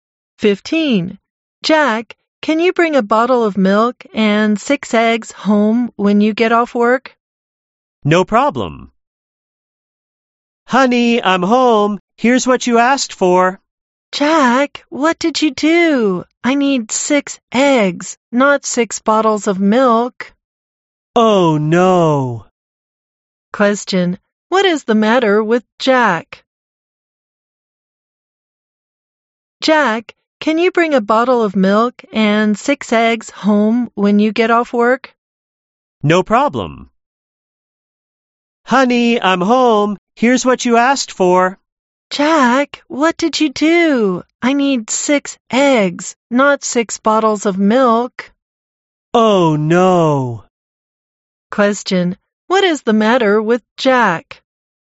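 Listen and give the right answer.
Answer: He bought 6 bottles of milk instead of 6 eggs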